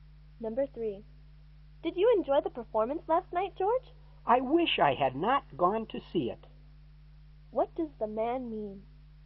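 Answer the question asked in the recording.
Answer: He didn't enjoy the performance.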